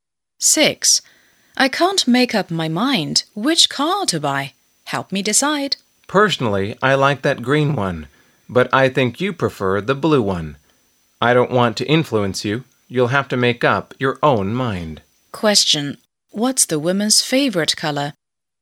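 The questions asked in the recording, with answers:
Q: What's the woman's favorite color?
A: Green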